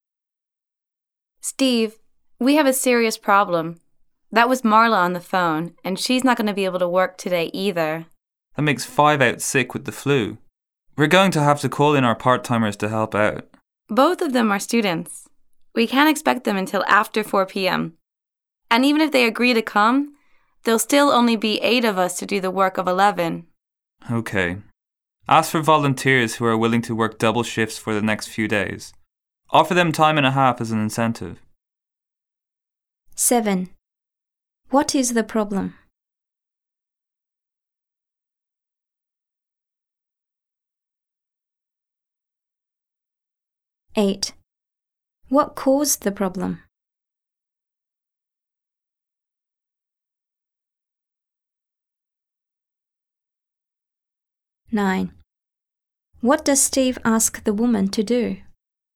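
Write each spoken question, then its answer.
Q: What is the problem?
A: They are short of workers because five staff members are out sick.

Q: What caused the problem?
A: The flu

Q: What does Steve ask the woman to do?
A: Ask for volunteers to work double shifts for the next few days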